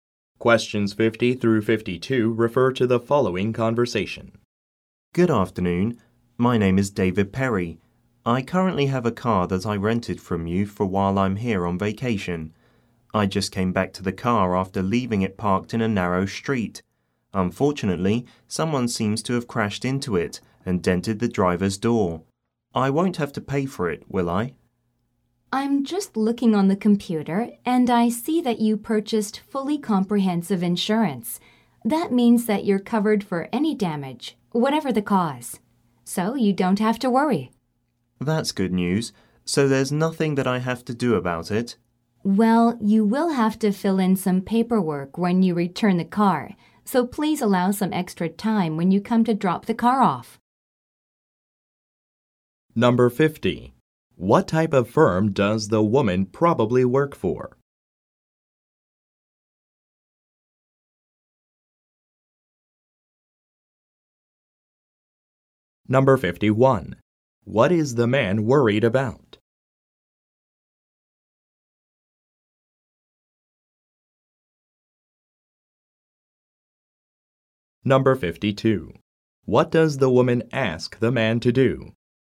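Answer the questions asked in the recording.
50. A car rental company
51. Having to pay for damage to the rented car
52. Allow extra time when returning the car to fill in paperwork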